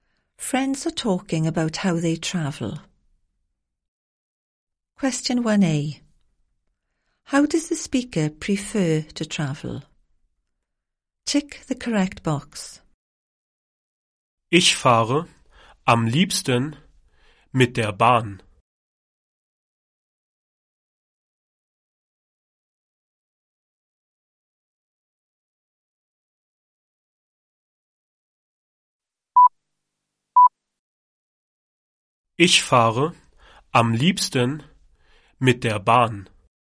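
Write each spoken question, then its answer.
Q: How does the speaker prefer to travel?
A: By train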